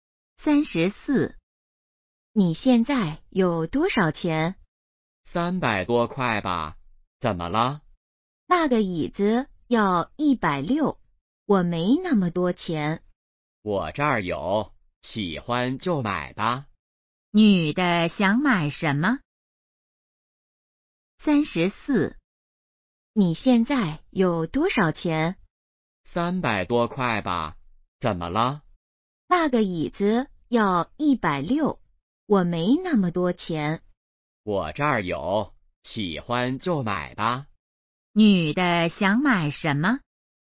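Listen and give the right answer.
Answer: 椅子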